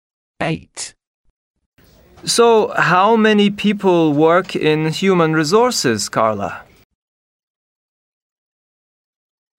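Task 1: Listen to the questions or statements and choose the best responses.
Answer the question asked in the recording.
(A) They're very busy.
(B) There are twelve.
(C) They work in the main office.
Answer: (B) There are twelve.

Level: A2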